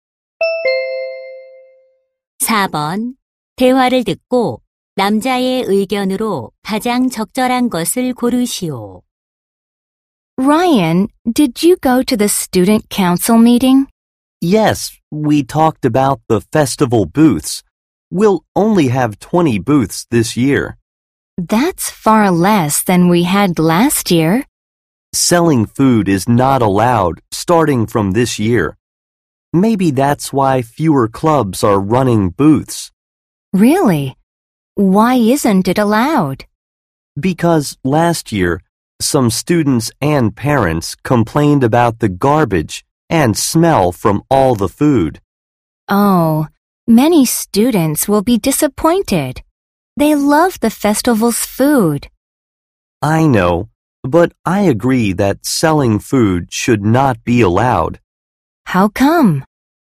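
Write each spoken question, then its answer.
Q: 대화를 듣고 남자의 의견으로 가장 적절한 것을 고르시오.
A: 학교 축제에서 음식 판매를 허용해서는 안 된다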